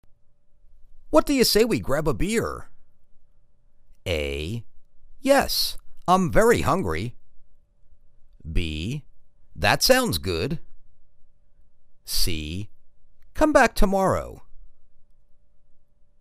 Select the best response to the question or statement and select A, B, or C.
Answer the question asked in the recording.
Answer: That sounds good.